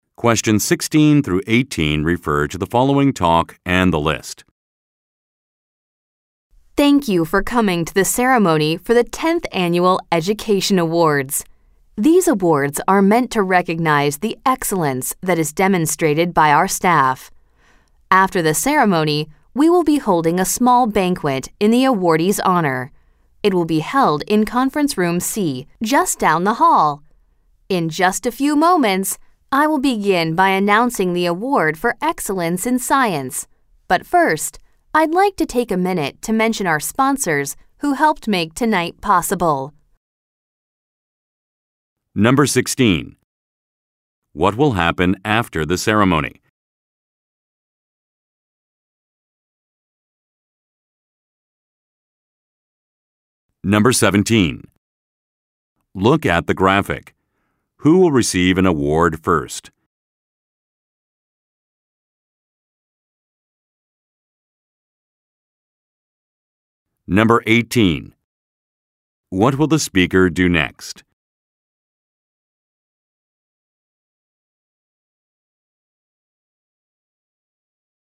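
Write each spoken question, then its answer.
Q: What will happen after the ceremony?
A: A small banquet will be held in the awardees' honor.

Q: What will the speaker do next?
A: Mention the sponsors.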